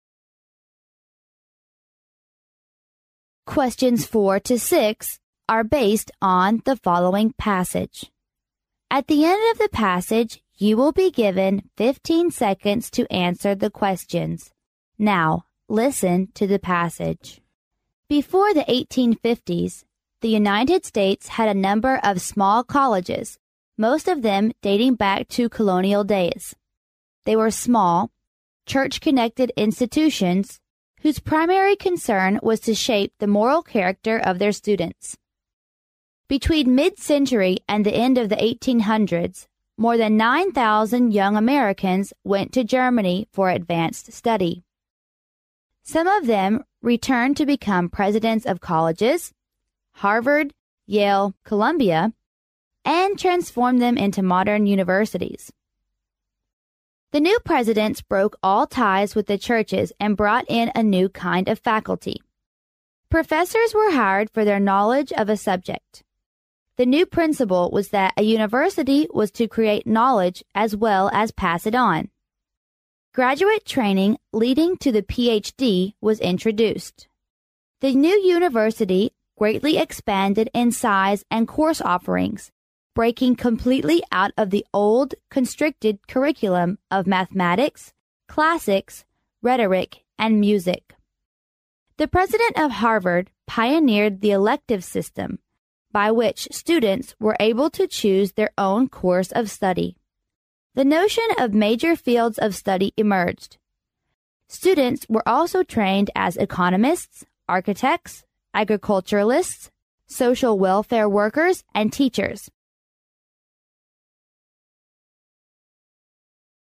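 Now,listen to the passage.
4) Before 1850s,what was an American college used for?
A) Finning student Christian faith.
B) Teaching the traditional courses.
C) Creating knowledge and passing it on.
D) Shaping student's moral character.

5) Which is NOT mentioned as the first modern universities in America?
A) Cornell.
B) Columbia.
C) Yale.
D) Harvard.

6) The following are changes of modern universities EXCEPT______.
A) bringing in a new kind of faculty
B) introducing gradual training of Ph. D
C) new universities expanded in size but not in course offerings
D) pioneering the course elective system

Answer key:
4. Shaping student's moral character.
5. Cornell.
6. new universities expanded in size but not in course offerings

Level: 英语四级

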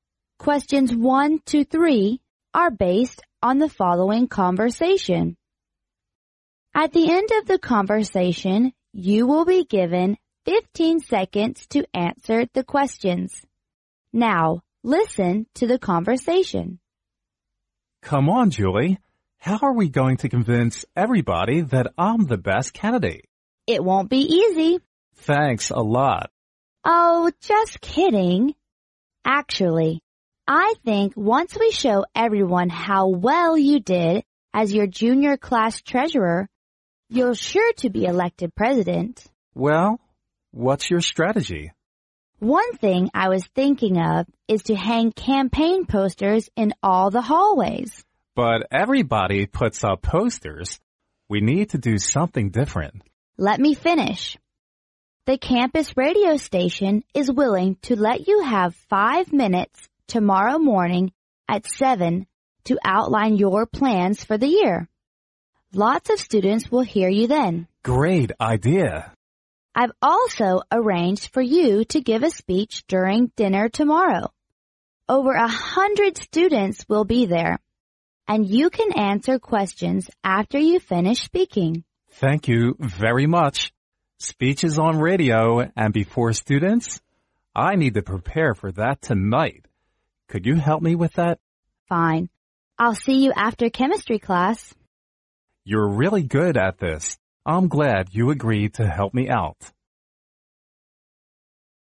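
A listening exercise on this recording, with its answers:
Now, listen to the conversation.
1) What election are the speakers discussing?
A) The election of class treasurer.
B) The election of students,President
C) The election of school's President.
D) The election of class monitor.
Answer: The election of students,President

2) What does the man mean by saying "Thanks a lot!"?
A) He wants to thank Julie.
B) He hopes Julie can help him.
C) He wishes the election went well.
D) He is upset about what Julie said.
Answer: He is upset about what Julie said.

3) What will the speakers do after chemistry class?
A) To hang campaign posters in all the hallways.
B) To prepare for the speeches tomorrow.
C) To practise the man's speech on video tomorrow morning.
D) To outline the man's plans for the year.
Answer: To prepare for the speeches tomorrow.

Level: 英语四级

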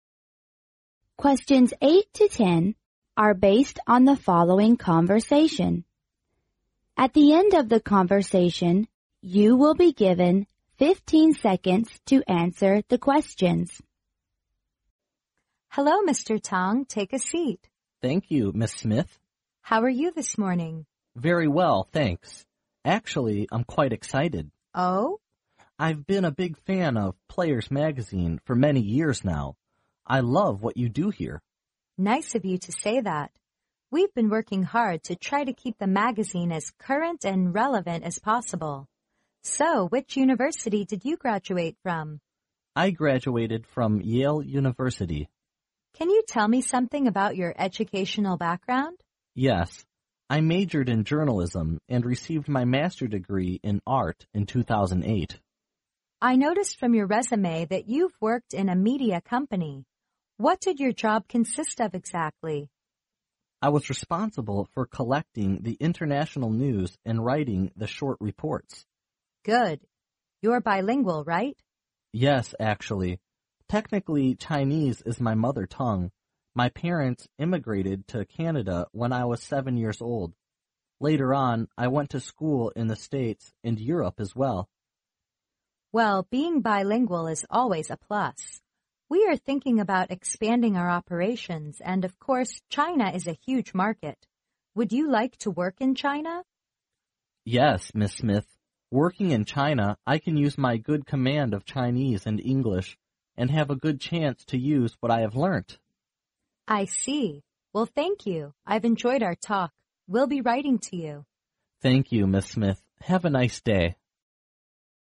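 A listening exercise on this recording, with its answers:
Now, listen to the conversation.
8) In the university Mr. Tang majored in_____.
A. Chinese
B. English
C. international operation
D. journalism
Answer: journalism

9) When Mr. Tang worked in a media company,which of the following was he responsible for?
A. Writing the current reports.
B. Gathering the international news.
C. Keeping the magazine relevant.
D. Expanding the operations.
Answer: Gathering the international news.

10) If Mr. Tang accepts the job and works in China, he can_____.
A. have a good chance to immigrate to China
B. have a good opportunity to meet his parents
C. make a good use of his operation ability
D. make a good use of his Chinese and English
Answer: make a good use of his Chinese and English

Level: 英语四级

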